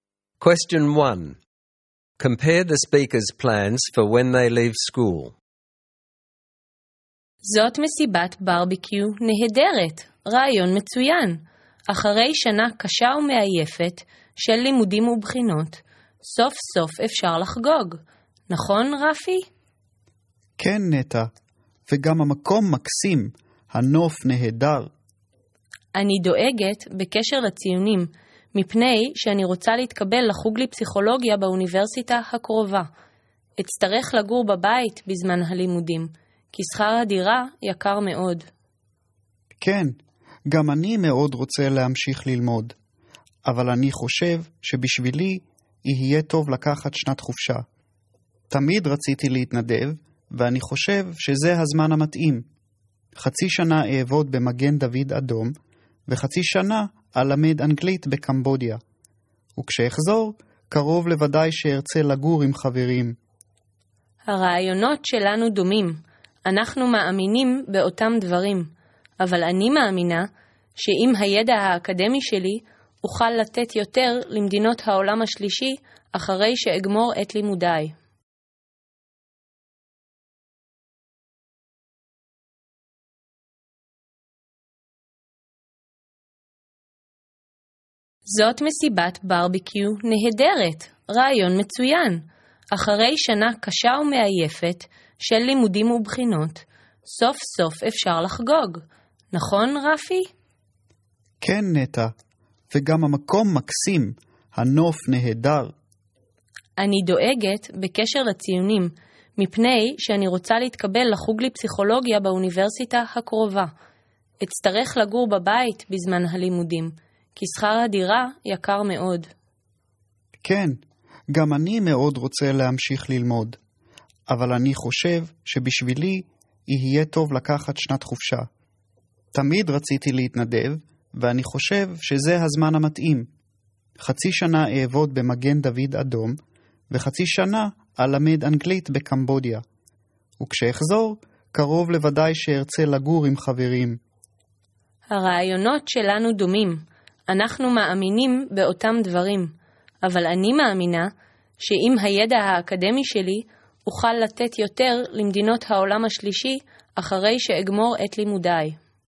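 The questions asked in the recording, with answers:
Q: Compare the speaker's plans for when they leave school.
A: Neta wants to study psychology at the local university and live at home because rent is expensive; Rafi will take a gap year volunteering (half a year with Magen David Adom, half teaching English in Cambodia), then live with friends. Both want to help, but Neta believes her academic knowledge will let her give more to the Third World after her studies.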